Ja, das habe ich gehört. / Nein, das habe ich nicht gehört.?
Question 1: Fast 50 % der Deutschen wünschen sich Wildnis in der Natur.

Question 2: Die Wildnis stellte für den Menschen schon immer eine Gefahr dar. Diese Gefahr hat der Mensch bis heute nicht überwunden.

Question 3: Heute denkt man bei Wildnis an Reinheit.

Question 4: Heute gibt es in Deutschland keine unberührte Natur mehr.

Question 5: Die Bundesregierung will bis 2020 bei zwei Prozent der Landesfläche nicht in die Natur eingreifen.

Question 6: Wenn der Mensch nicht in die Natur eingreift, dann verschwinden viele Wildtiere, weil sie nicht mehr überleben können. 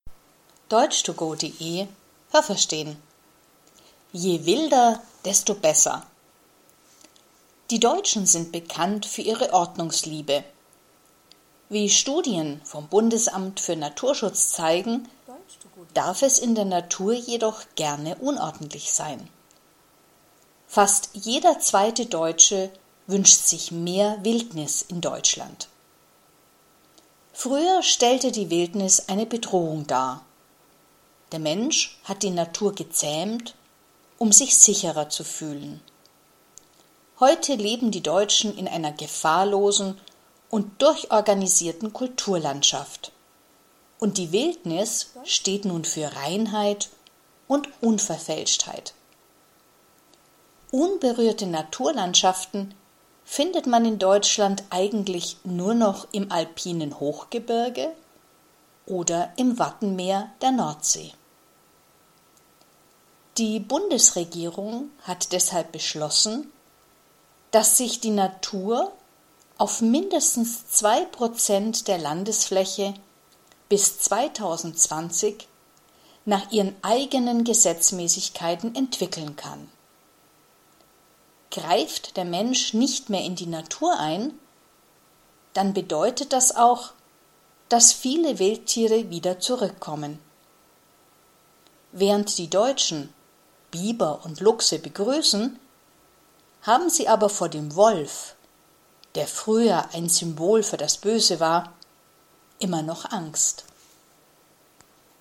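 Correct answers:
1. Ja, das habe ich gehört.
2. Nein, das habe ich nicht gehört.
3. Ja, das habe ich gehört.
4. Nein, das habe ich nicht gehört.
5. Ja, das habe ich gehört.
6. Nein, das habe ich nicht gehört.

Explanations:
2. Früher war die Wildnis noch eine Bedrohung, aber heute nicht mehr.
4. Im alpinen Hochgebirge und im Wattenmeer der Nordsee gibt es noch unberührte Natur.

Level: B2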